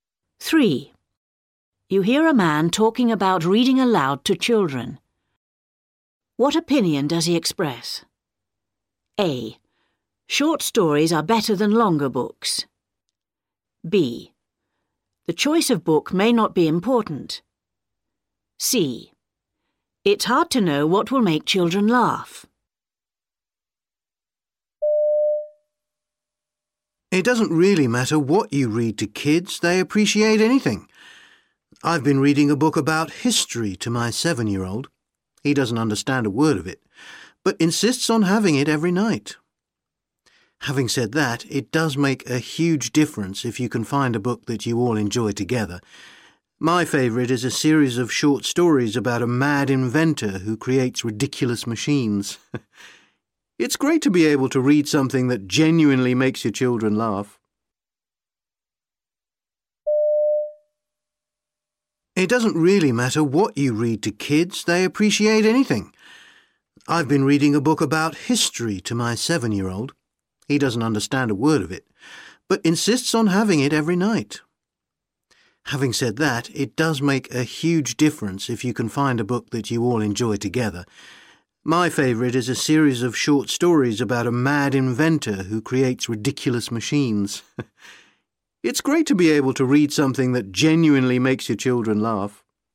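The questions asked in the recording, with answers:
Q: What opinion does he express?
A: B: The choice of book may not be important.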